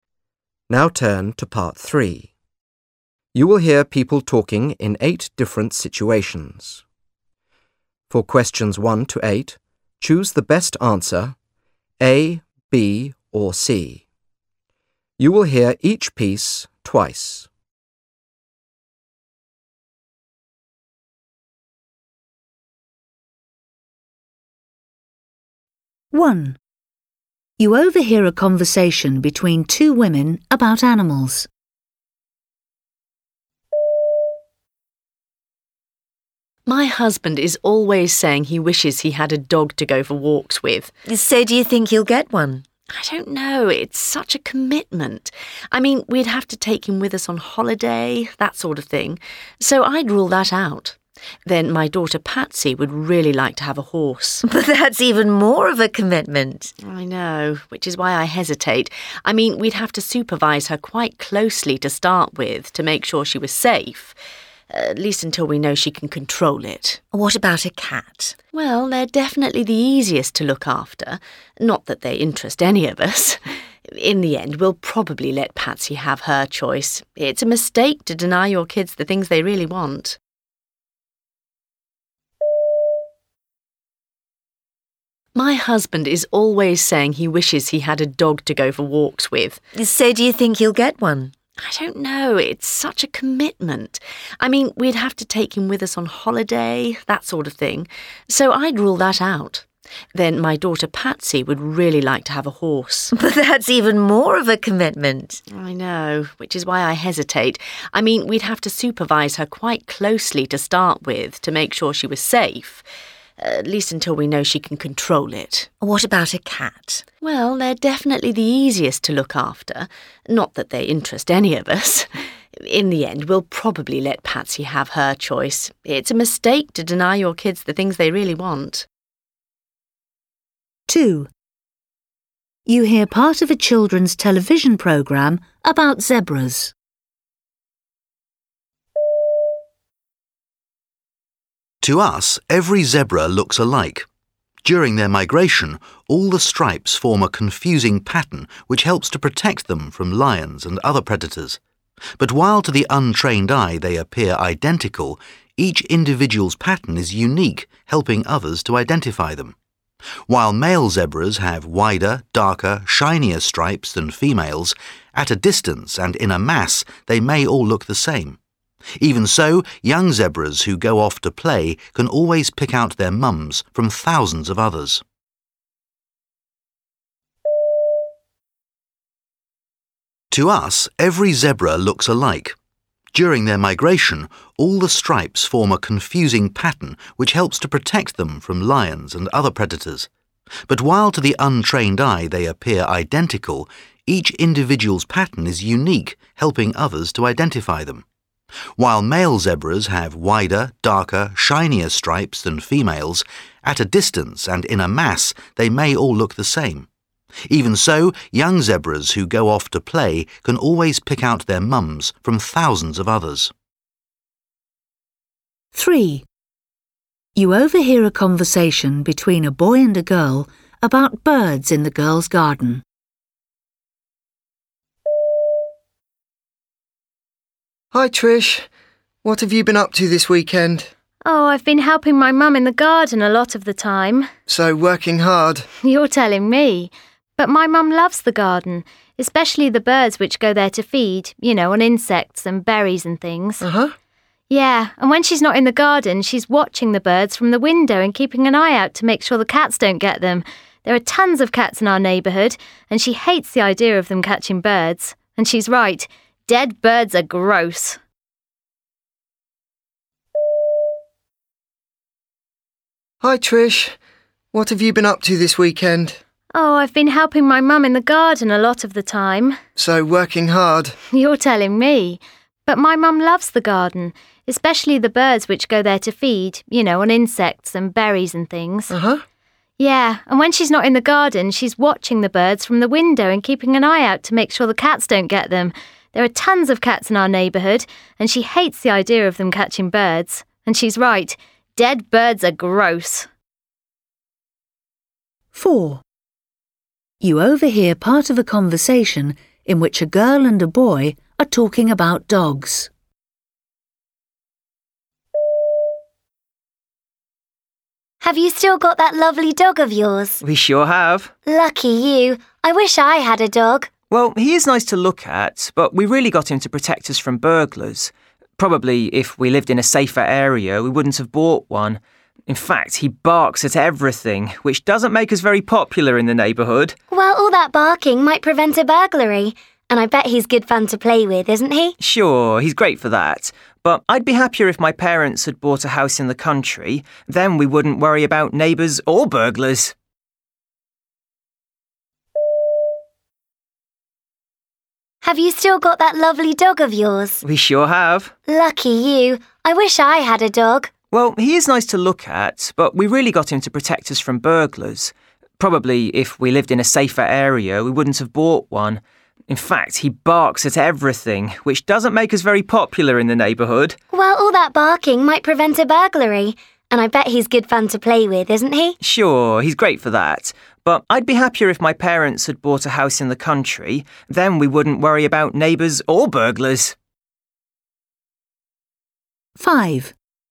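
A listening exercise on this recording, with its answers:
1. You overhear a conversation between two women about animals. Which animal does she think her family will choose?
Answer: A horse

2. You hear part of a television programme about zebras. What does the presenter say about their appearance?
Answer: Zebras can recognise each other by their stripes.

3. You overhear a conversation between a boy and a girl about birds in the girl's garden. How does the girl's mother feel about birds?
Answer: She worries about them.

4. You overhear part of a conversation in which a girl and a boy are talking about dogs. What is the boy doing?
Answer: complaining about his dog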